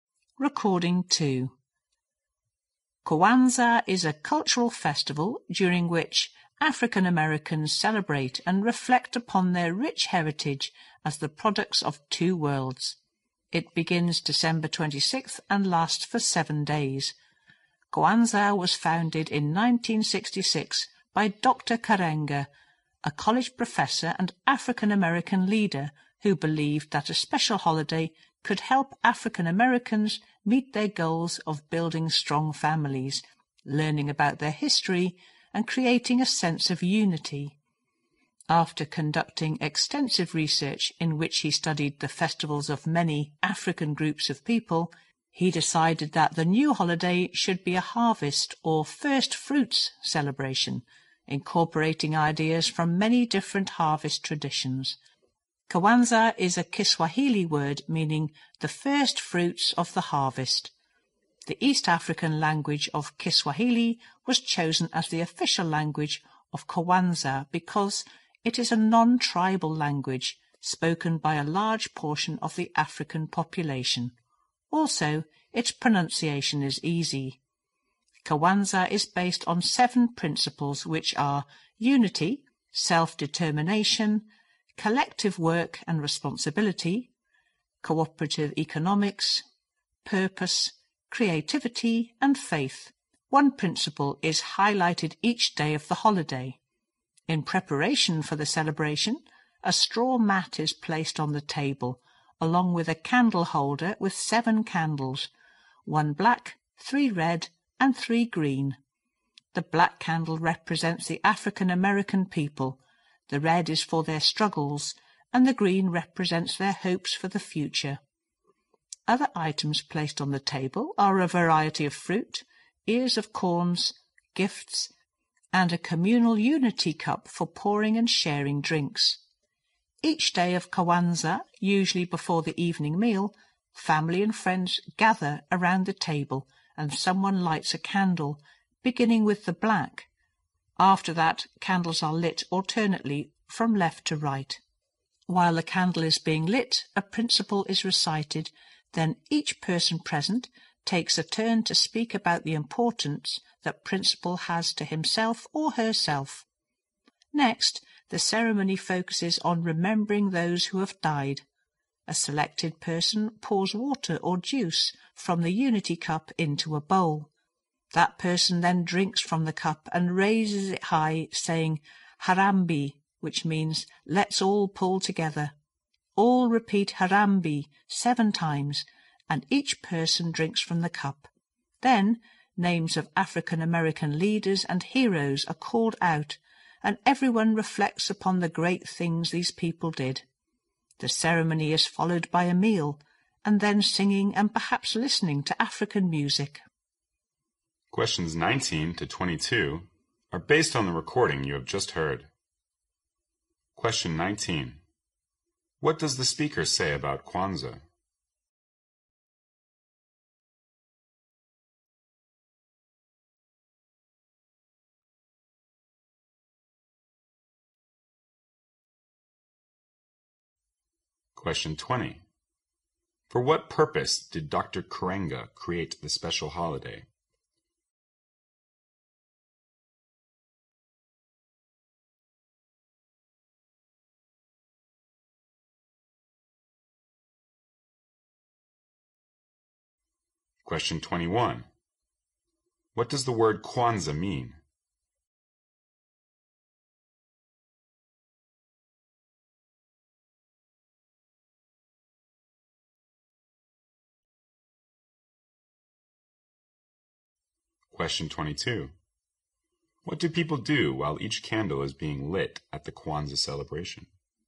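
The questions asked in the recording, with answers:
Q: For what purpose did Dr. Karenga create the special holiday?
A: To help African Americans build strong families, learn their history and create unity

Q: What does the word Kwanzaa mean?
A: The first fruits of the harvest

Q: What do people do while each candle is being lit at the Kwanzaa celebration?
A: They recite a principle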